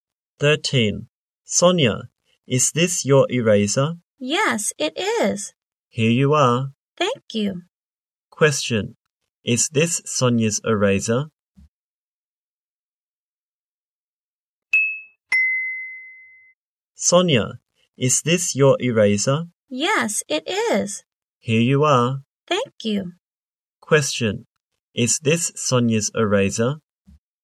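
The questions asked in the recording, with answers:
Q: Is this Sonia's eraser?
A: Yes, it is.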